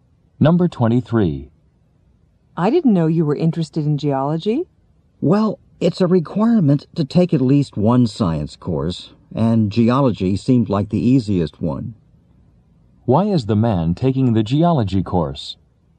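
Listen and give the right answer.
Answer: It fulfills a science requirement and seemed easiest.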